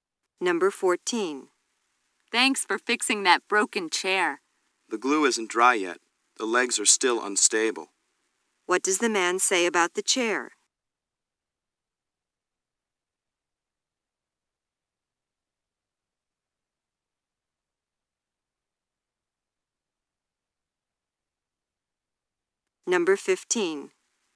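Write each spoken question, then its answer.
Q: What does the man say about the chair?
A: It isn't ready to use yet because the glue is still wet.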